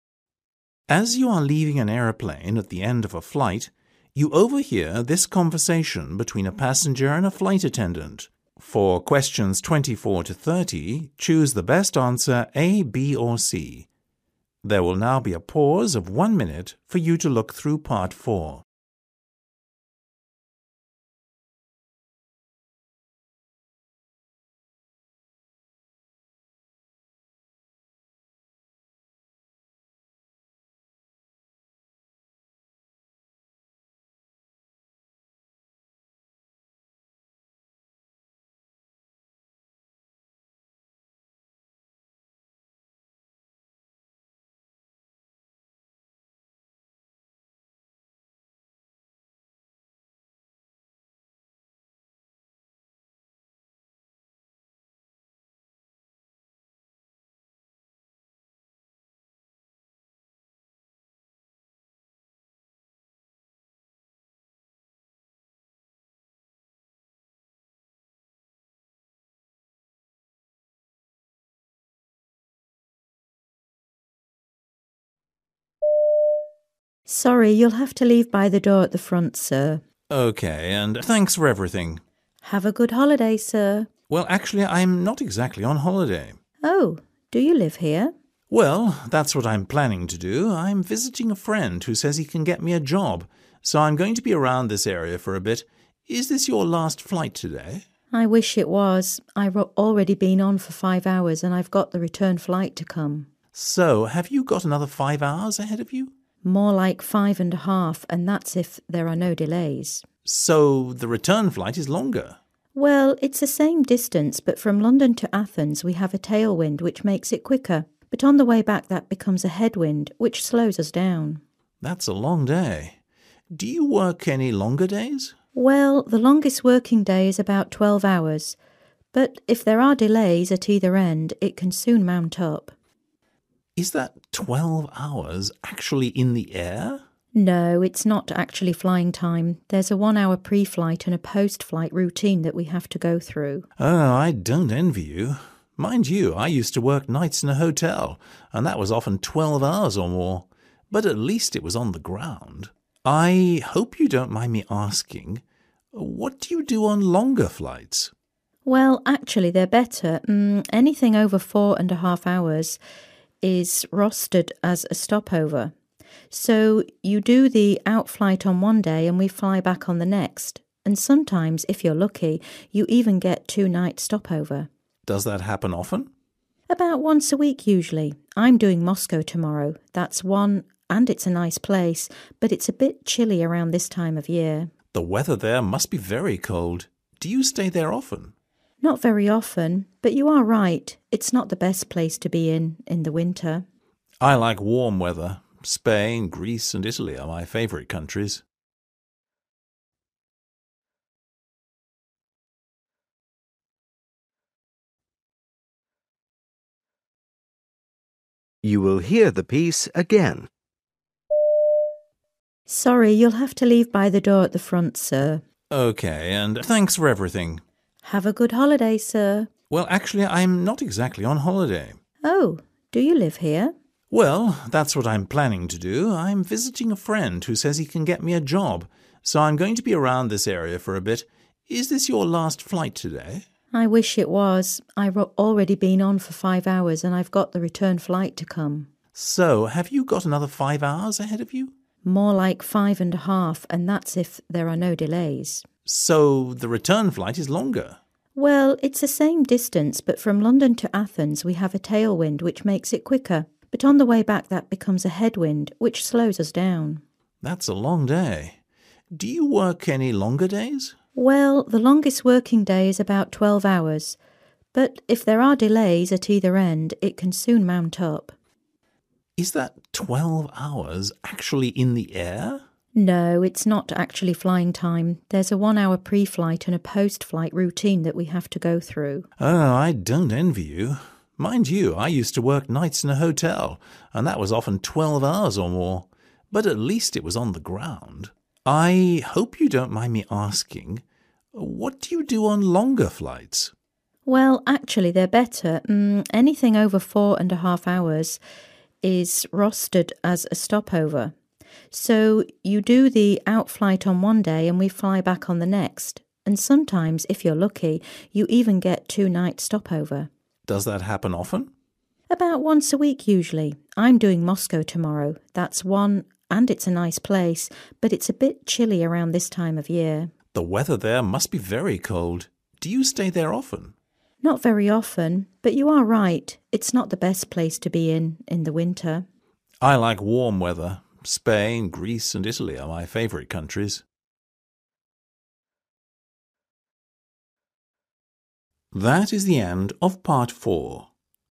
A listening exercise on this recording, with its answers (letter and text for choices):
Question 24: What is the passenger doing in Athens?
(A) spending a holiday there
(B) trying to get a job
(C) buying a house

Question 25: How many more hours will the flight attendant be working today?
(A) five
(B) at least five and a half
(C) twelve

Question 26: What is true about the trips from Athens to London and from London to Athens?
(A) same distance, different journey time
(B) different distance, same journey time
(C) same distance and same journey time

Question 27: How does the flight attendant feel about longer flights?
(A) She finds them difficult.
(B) She doesn't give an opinion.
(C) She prefers them.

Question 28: How often does the flight attendant get to stay somewhere for two nights?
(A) almost every week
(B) once a month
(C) very rarely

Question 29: What is the flight attendant's attitude towards going to Moscow?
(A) She finds the living conditions difficult.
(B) She is curious to find out what it is like.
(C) She is looking forward to going.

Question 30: What is the weather like in Moscow these days?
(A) warm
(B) cold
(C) summery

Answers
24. (B) trying to get a job
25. (B) at least five and a half
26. (A) same distance, different journey time
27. (C) She prefers them.
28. (A) almost every week
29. (C) She is looking forward to going.
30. (B) cold

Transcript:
FA: Sorry, you'll have to leave by the door at the front, sir.
P: OK, and thanks for everything.
FA: Have a good holiday, sir.
P: Well, actually I'm not exactly on holiday.
FA: Oh? Do you live here?
P: Well, that's what I'm planning to do. I'm visiting a friend who says he can get me a job. So, I'm going to be around this area for a bit. Is this your last flight today?
FA: I wish it was. I've already been 'on' for five hours and I've got the return flight to come.
P: So, have you got another five hours ahead of you?
FA: More like five and a half and that's if there are no delays!
P: So, the return flight is longer?
FA: Well, it's the same distance but from London to Athens we have a tail wind which makes it quicker ... but on the way back that becomes a head wind which slows us down.
P: That's a long day. Do you work any longer days?
FA: Well, the longest working day is about twelve hours ... but if there are delays at either end, it can soon mount up.
P: Is that twelve hours – actually in the air?
FA: No, it's not actually flying time. There's a one-hour pre-flight and post-flight routine that we have to go through.
P: Oh, I don't envy you. Mind you, I used to work nights in a hotel and that was often twelve hours or more. But at least it was on the ground. I hope you don't mind me asking ... what do you do on longer flights?
FA: Well, actually they're better ... anything over four and a half hours is rostered as a stop over ... so you do the outflight on one day and we fly back on the next. And sometimes, if you're lucky, you even get a two-night stop-over.
P: Does that happen often?
FA: About once a week usually. I'm doing Moscow tomorrow, that's one ... and it's a nice place ... but it's a bit chilly around this time of year.
P: The weather there must be very cold. Do you stay there often?
FA: Not very often. But you are right; it's not the best place to be in in the winter!
P: I like warm weather. Spain, Greece and Italy are my favourite countries.

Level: B2